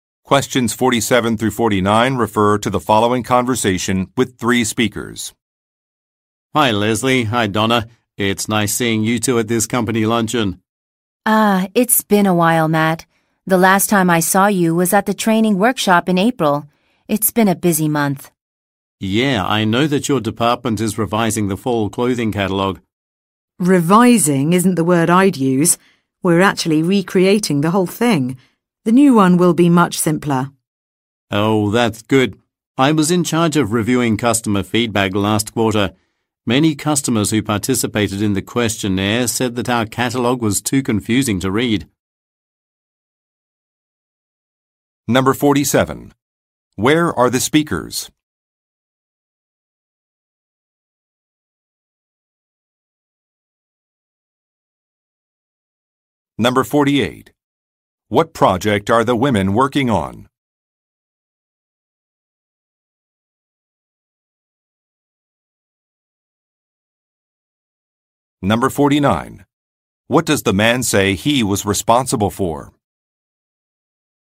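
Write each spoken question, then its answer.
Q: Where are the speakers?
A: At a company luncheon

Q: What project are the women working on?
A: Recreating the fall clothing catalog

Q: What does the man say he was responsible for?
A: Reviewing customer feedback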